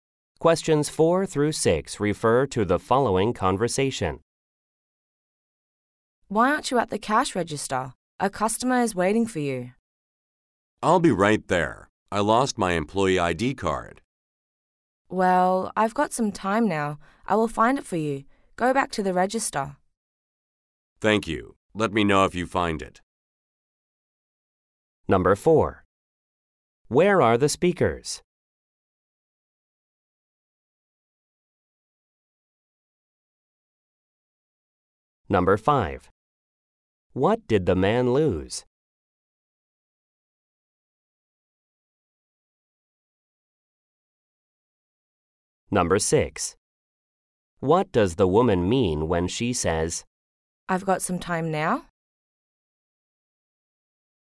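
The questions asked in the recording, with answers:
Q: What did the man lose?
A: His employee ID card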